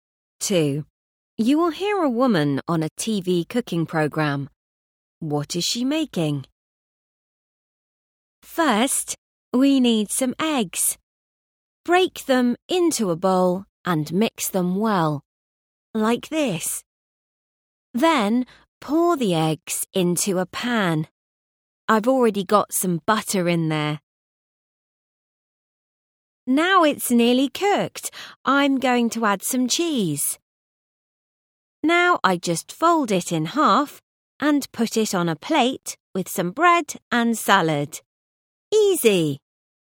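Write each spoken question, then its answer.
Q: What is she making?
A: a cheese omelette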